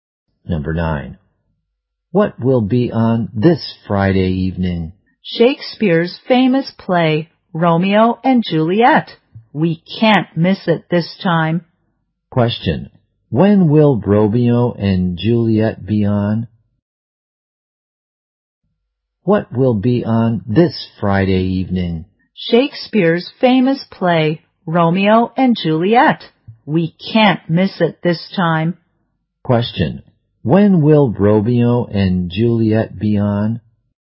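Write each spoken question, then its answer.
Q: When will Romeo and Juliet be on?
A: This Friday evening.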